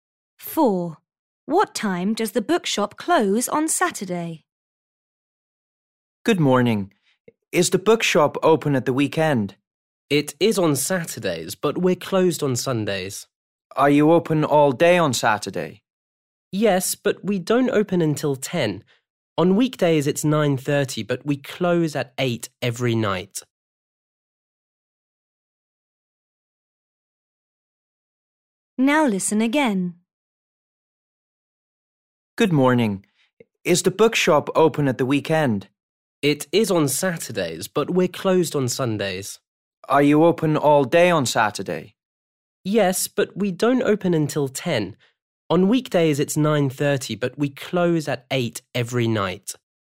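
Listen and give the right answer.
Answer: At 8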